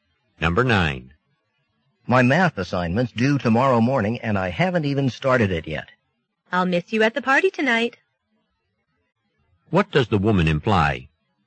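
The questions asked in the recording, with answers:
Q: What does the woman imply?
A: The man won't go to the party because he must do his assignment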